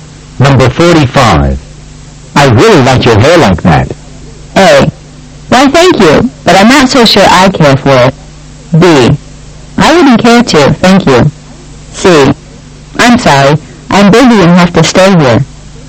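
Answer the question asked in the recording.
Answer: A: Why, thank you, but I'm not so sure I care for it.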